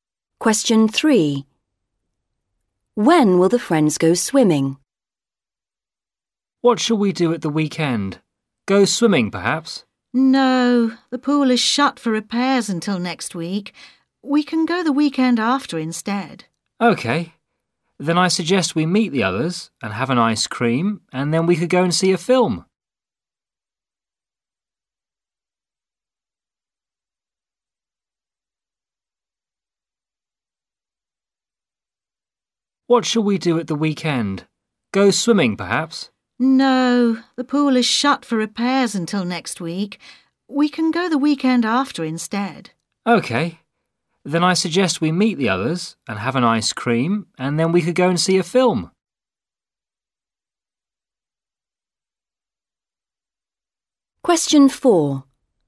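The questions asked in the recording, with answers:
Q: When will the friends go swimming?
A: The weekend after next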